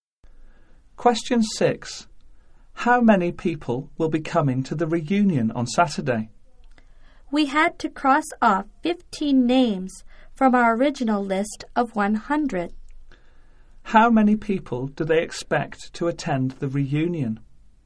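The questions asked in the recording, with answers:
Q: How many people do they expect to attend the reunion?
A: 85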